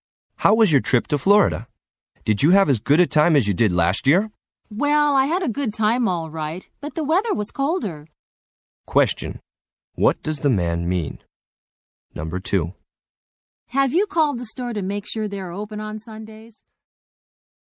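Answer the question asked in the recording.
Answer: He enjoyed the trip, but the weather was colder than last year.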